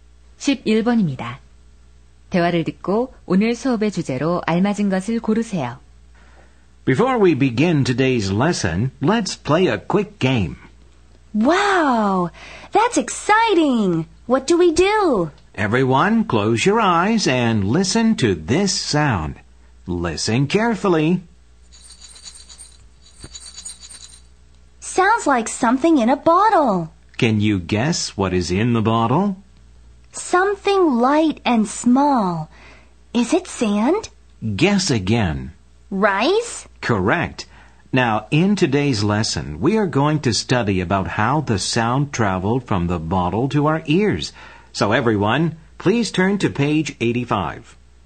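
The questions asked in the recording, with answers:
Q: 대화를 듣고 오늘 수업의 주제로 알맞은 것을 고르세요.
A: 소리가 전달되는 방법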